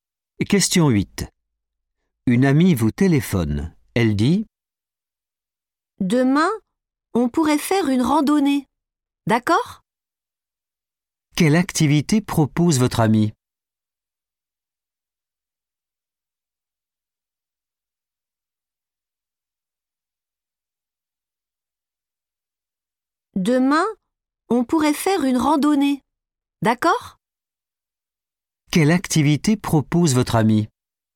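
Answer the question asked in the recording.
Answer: une randonnée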